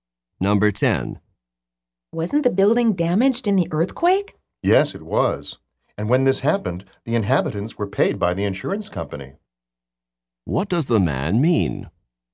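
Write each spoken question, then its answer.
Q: What does the man mean?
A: The insurance company paid the inhabitants for the earthquake damage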